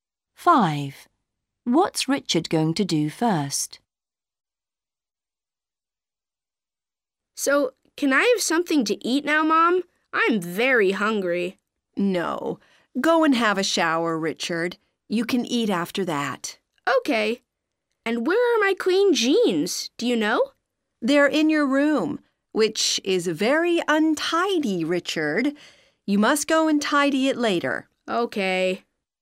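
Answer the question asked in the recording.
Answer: have a shower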